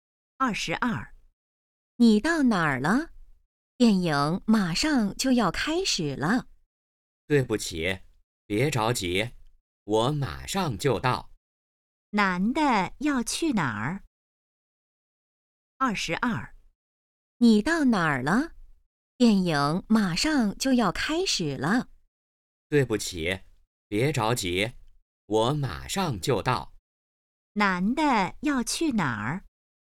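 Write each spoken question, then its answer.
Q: 男的要去哪儿?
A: 电影院(看电影)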